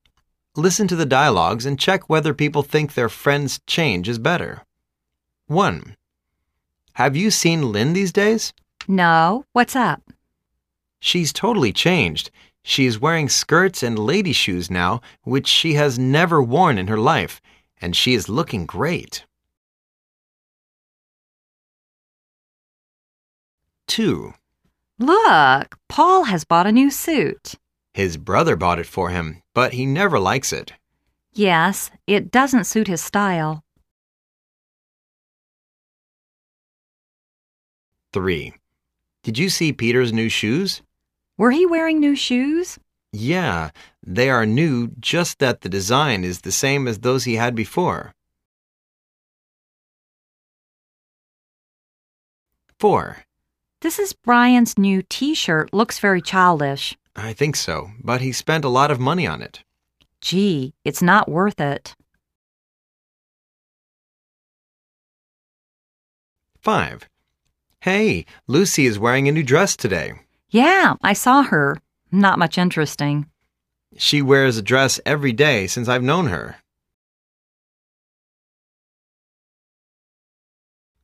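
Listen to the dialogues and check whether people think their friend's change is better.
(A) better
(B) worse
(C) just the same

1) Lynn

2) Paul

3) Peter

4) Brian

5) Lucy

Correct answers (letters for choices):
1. A
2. B
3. C
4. B
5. C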